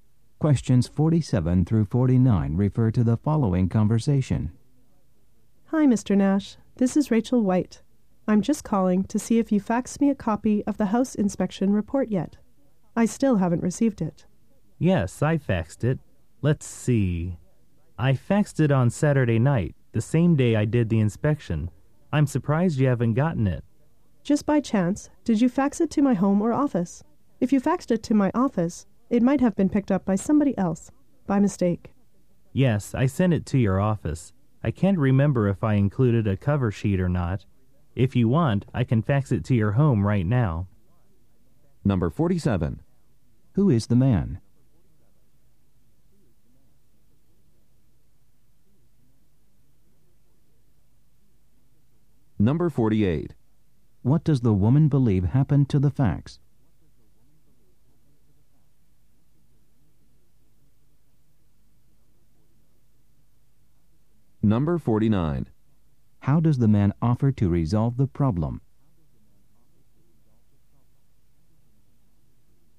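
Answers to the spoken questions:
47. A house inspector
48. Someone else at her office picked it up by mistake
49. By faxing it to her home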